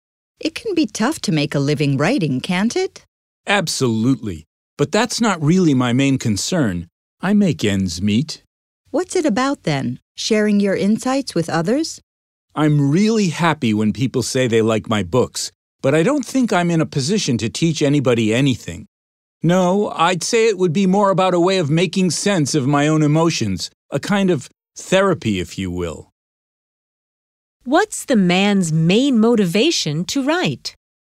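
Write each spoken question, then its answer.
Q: What's the man's main motivation to write?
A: To make sense of his own emotions, a kind of therapy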